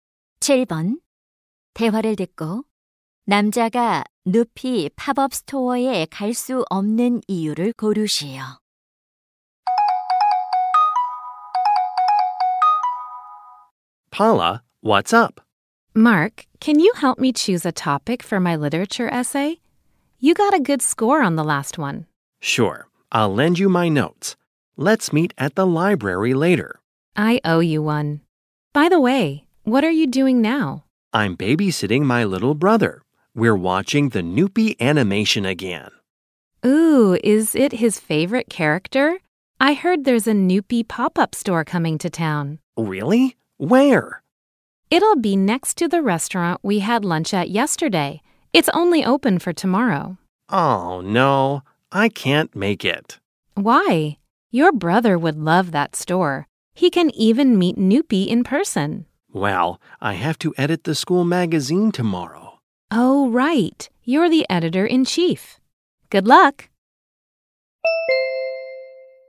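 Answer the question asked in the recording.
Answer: 학교 잡지를 편집해야 해서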